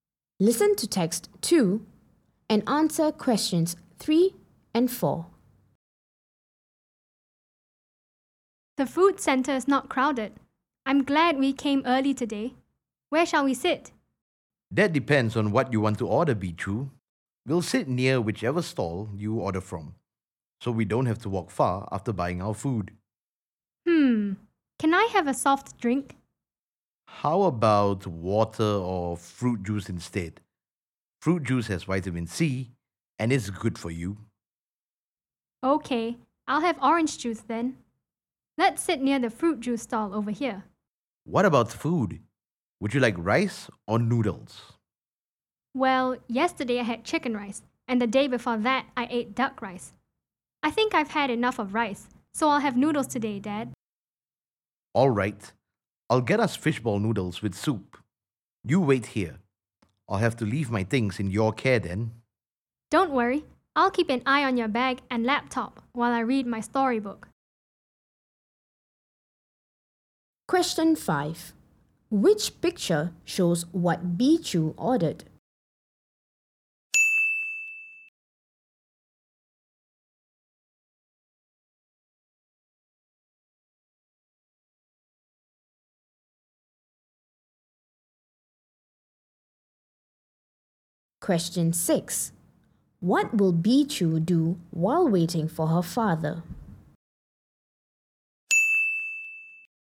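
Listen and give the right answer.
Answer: Read her storybook and keep an eye on his bag and laptop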